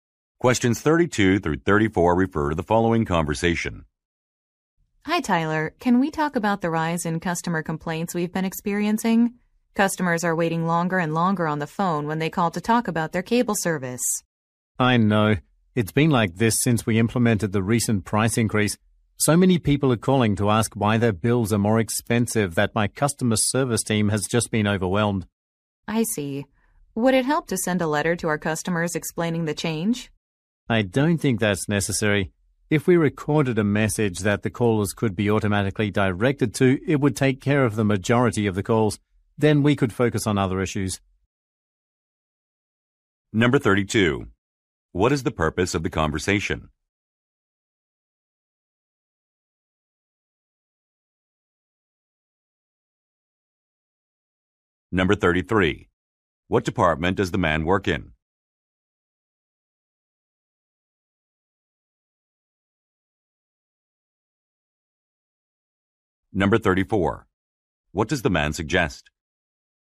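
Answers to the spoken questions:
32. To discuss the rise in customer complaints about long phone waits
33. Customer service
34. Recording an automated message for callers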